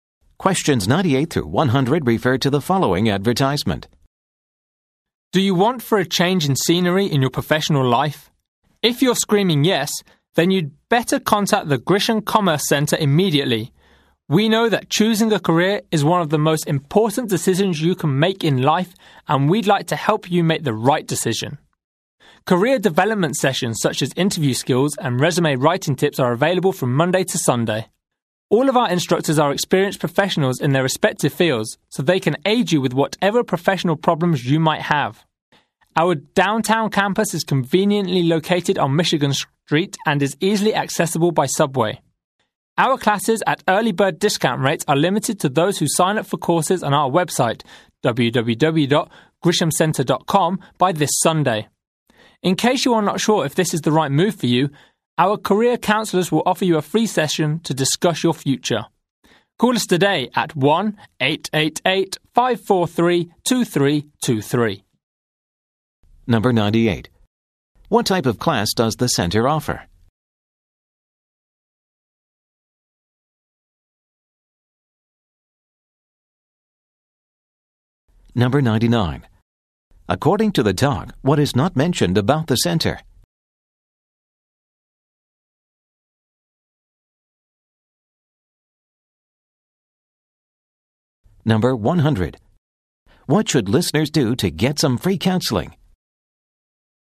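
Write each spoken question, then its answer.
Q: What type of class does the centre offer?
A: Career development sessions, such as interview skills and resume writing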